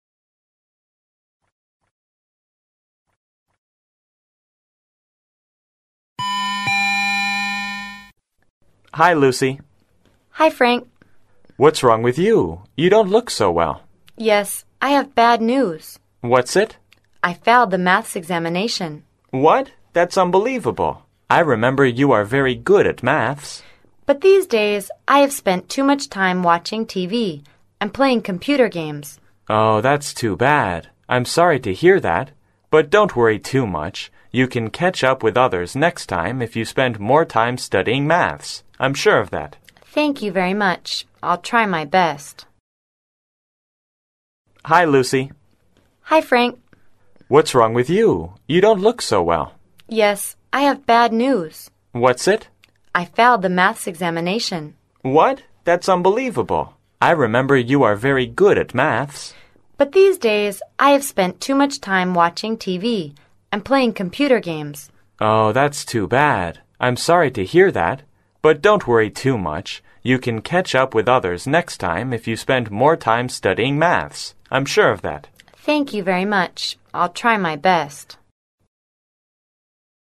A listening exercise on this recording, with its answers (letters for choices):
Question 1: What is the possible relationship between these two speakers?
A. Friends.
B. Teacher and student.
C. Daughter and father.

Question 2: What is the bad news?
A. Lucy is sick.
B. Lucy spends too much time playing football.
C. Lucy didn't pass the exam.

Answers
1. A
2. C